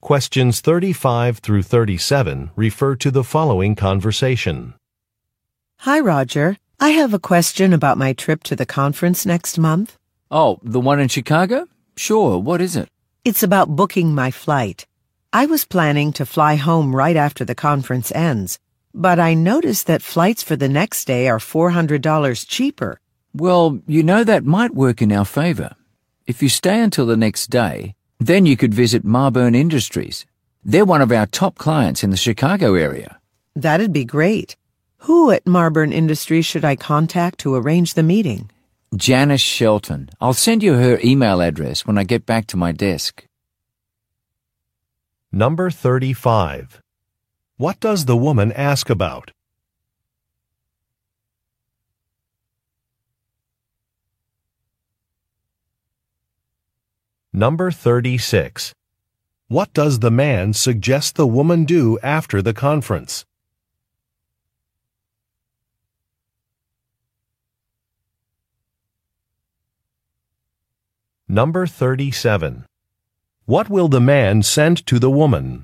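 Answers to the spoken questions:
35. Booking her flight for a conference trip
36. Visit a client, Marburn Industries
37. An email address (Janice Shelton's)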